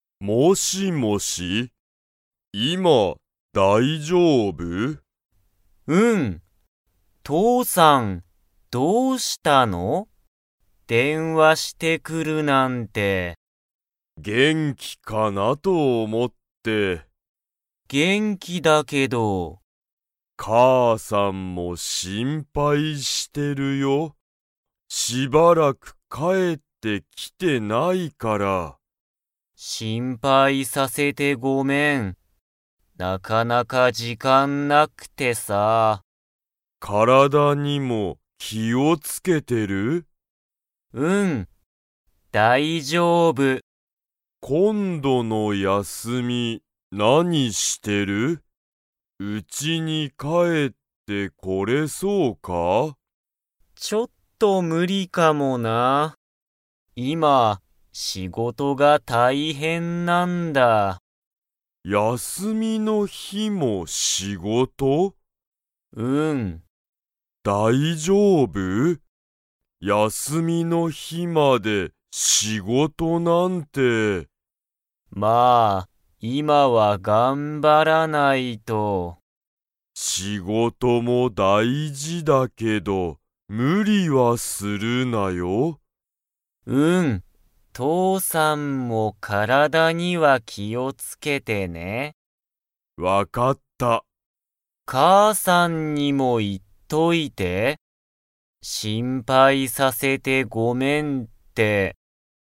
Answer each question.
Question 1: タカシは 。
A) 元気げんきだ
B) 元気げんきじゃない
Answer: 元気げんきだ

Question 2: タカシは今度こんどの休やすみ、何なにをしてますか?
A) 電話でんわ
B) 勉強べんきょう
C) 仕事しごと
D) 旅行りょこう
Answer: 仕事しごと

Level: Level 3

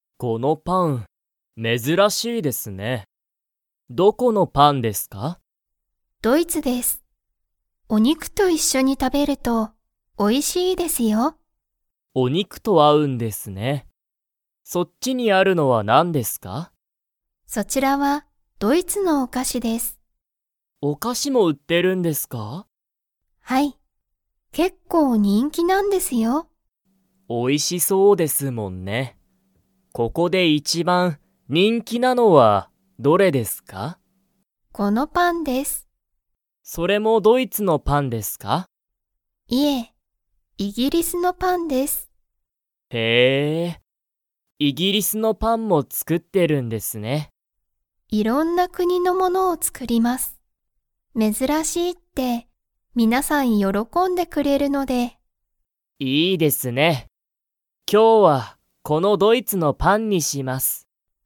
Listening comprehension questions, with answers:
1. ドイツのパンは、何なにと一緒いっしょに食たべると美味おいしいですか?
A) お菓子かし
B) イギリスのパン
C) 珍めずらしい料理りょうり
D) お肉にく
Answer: お肉にく

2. ナオキは、イギリスのパンを 。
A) 買かう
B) 買かわない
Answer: 買かわない

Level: Level 4

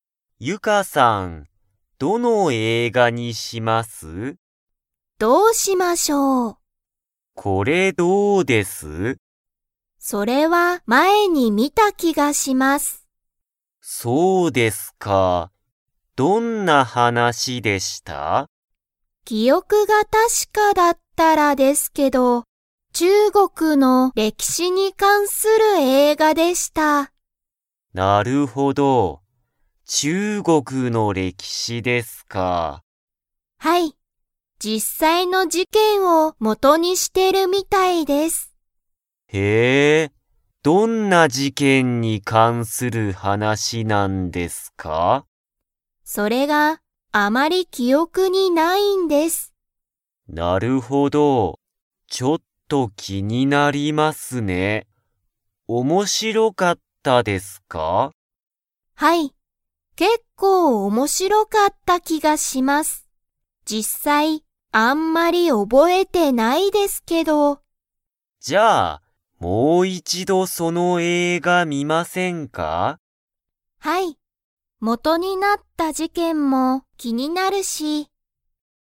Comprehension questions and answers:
Comprehension Quiz (Skip if you don't understand the conversation yet)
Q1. 中国ちゅうごくに関かんする映画えいがを見みたことがあるのは、誰だれですか?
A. さとし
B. ゆか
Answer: ゆか

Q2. その映画えいがは、 。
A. 怖こわかった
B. 短みじかかった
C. 面白おもしろかった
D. 難むずかしかった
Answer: 面白おもしろかった

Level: Level 3

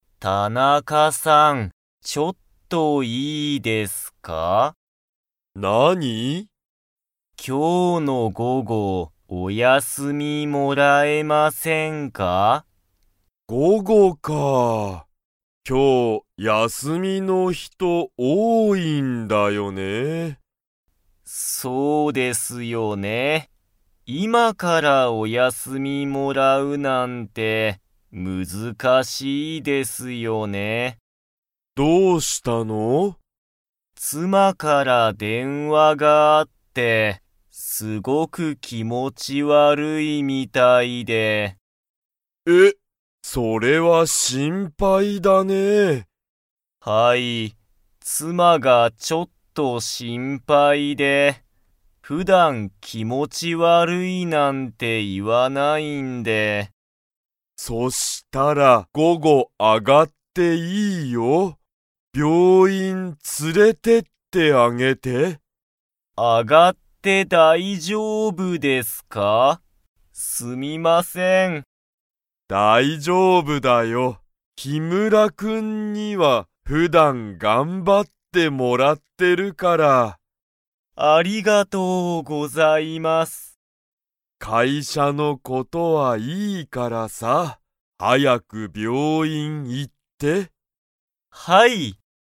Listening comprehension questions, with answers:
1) 今日きょう休やすみの人ひとは 。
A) 多おおい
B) 少すくない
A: 多おおい

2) 誰だれが気持きもち悪わるいと言いっていますか?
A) 木村きむらさんの母はは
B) 木村きむらさんの妻つま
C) 田中たなかさんの母はは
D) 田中たなかさんの妻つま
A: 木村きむらさんの妻つま

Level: Level 3

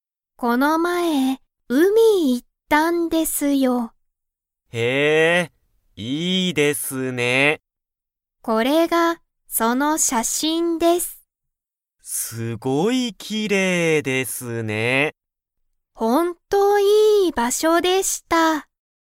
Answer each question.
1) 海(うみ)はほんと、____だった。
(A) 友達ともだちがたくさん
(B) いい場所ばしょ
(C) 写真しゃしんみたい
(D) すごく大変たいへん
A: いい場所ばしょ

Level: Level 1

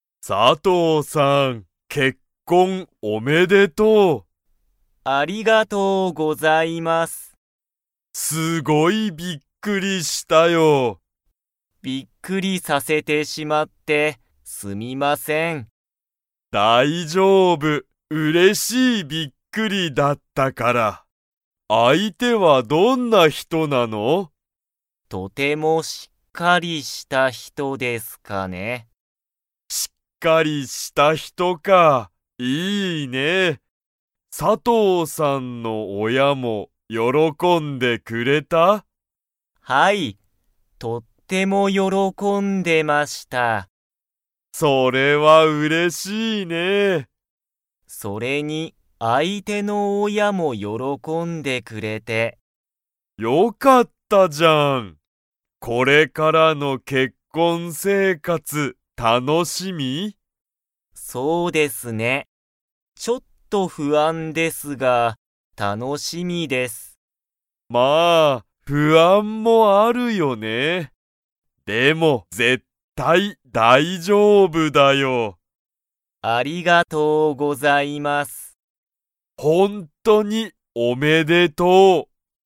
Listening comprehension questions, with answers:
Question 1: 佐藤さとうさんの相手あいては、どんな人ひとですか?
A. びっくりする人ひと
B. 怖こわい人ひと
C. 大丈夫だいじょうぶな人ひと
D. しっかりした人ひと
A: しっかりした人ひと

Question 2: 佐藤さとうさんは、結婚生活けっこんせいかつが 。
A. 楽たのしみだ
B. 楽たのしみじゃない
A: 楽たのしみだ

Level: Level 3

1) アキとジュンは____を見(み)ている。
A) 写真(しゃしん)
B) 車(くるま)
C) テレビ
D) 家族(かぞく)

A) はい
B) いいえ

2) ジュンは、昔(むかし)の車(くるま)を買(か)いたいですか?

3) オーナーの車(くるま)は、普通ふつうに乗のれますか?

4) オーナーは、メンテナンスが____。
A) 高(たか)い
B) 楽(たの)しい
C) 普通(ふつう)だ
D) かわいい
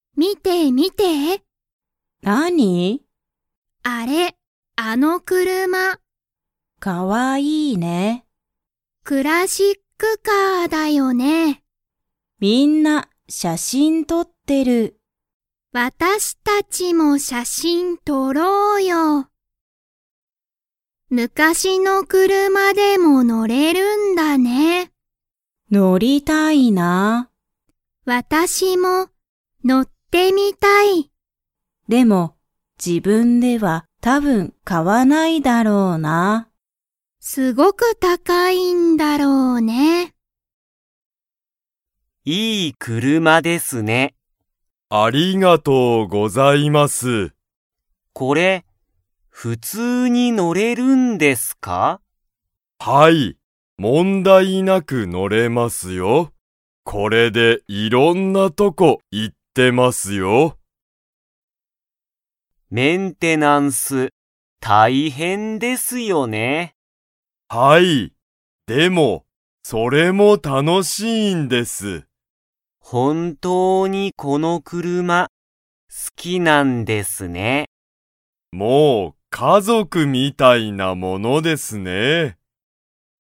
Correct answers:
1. 車(くるま)
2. いいえ
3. はい
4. 楽(たの)しい

